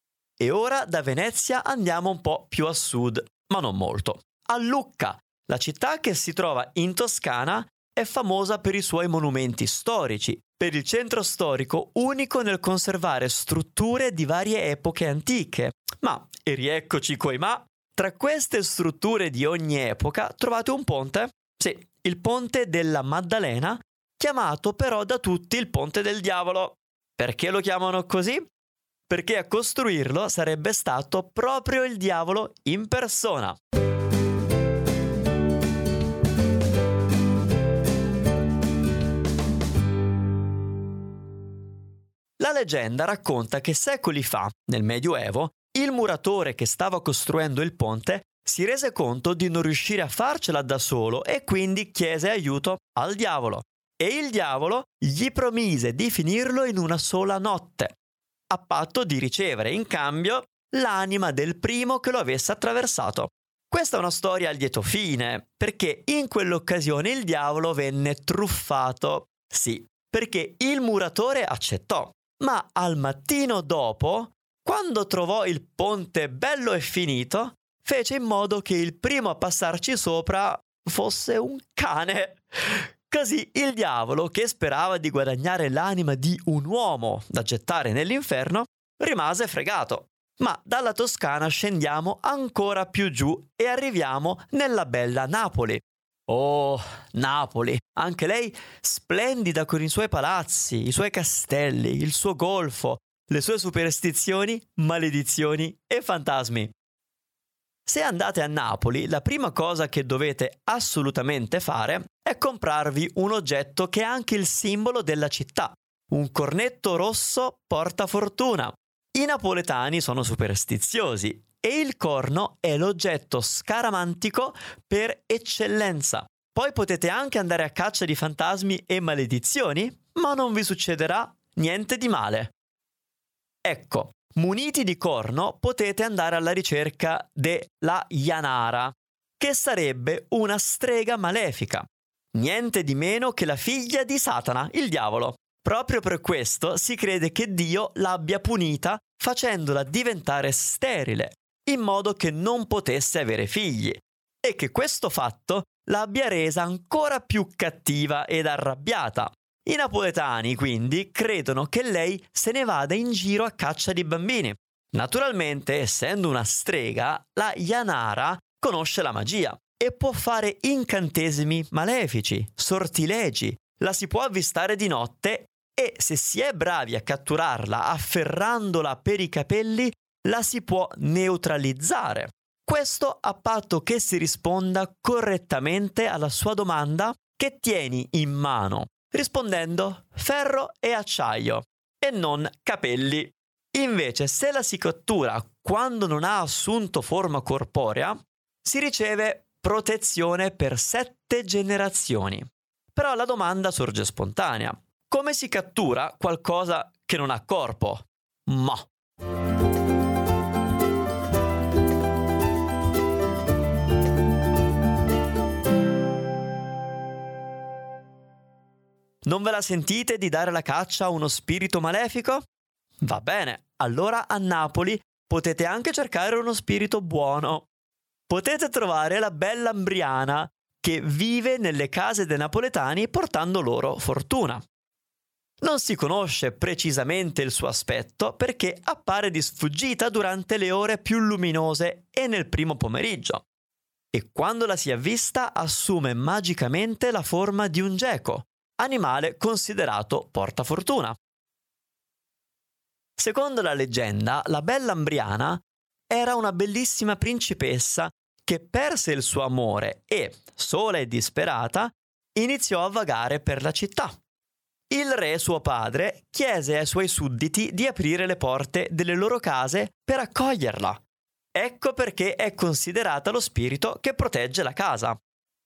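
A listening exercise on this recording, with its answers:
Here are your TRUE/ FALSE Comprehension questions.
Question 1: Si narra che a Lucca il Diavolo venne imbrogliato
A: Vero

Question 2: Il corno rosso napoletano non protegge dalle maledizioni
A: Falso

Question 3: Secondo la leggenda, La Janara è una fata buona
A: Falso

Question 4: La Bella 'Mbriana era una bellissima principessa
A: Vero

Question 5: Si dice che La Bella 'Mbriana appaia sotto forma di geco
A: Vero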